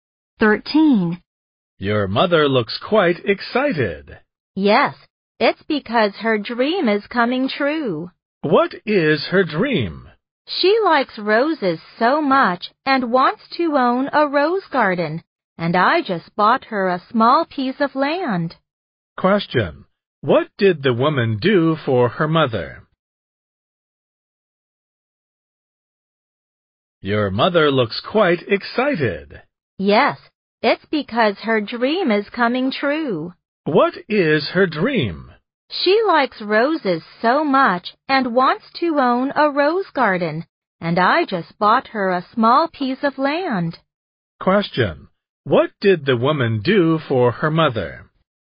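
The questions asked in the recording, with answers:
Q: What did the woman do for her mother?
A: She bought her a small piece of land for a rose garden.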